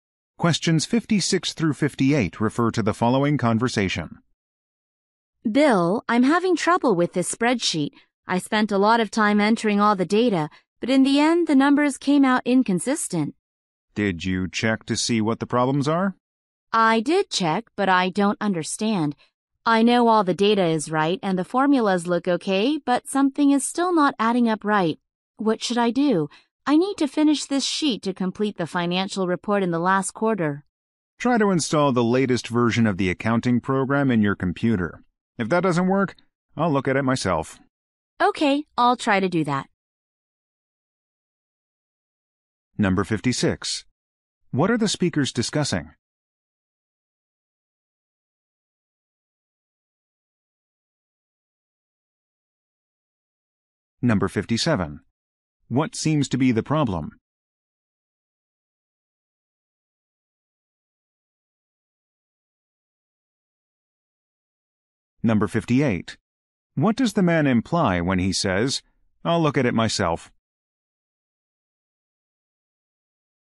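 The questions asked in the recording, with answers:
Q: What are the speakers discussing?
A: A spreadsheet for a financial report

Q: What seems to be the problem?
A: The numbers are inconsistent

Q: What does the man imply when he says, "I'll look at it myself"?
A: He will help if the update doesn't fix it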